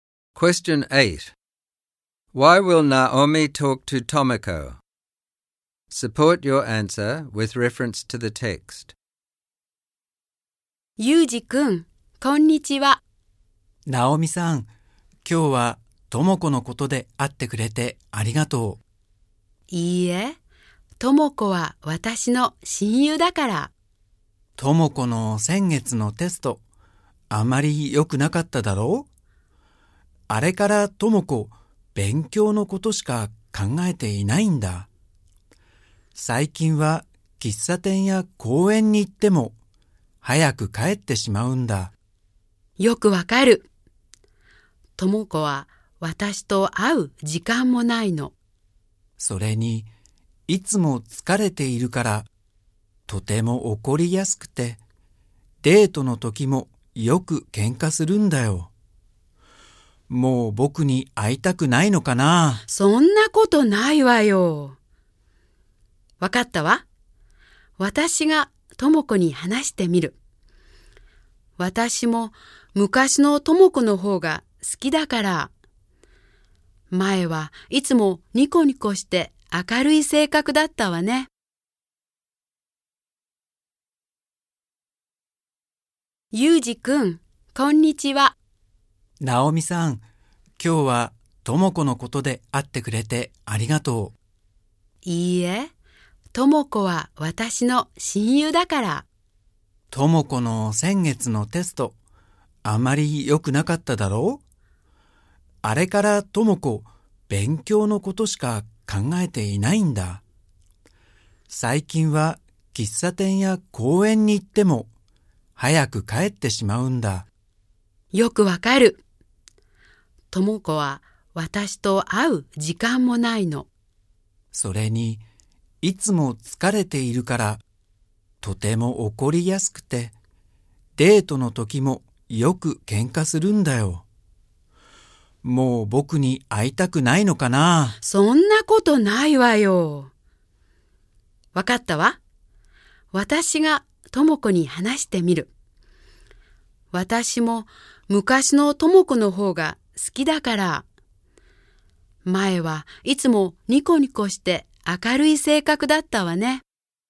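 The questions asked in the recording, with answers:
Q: Why will Naomi talk to Tomoko?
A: Since doing badly on a test, Tomoko only studies, is tired and quick to get angry, and argues with Yuji. Naomi is her best friend and wants back the cheerful, bright Tomoko she used to be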